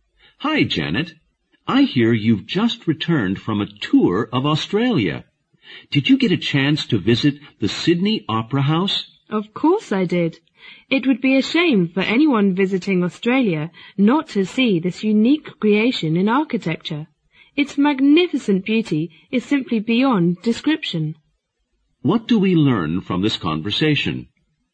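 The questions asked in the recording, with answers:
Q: What do we learn from this conversation?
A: Janet visited the Sydney Opera House and was greatly impressed by its beauty.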